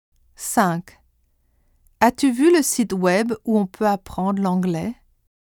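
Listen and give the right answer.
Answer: où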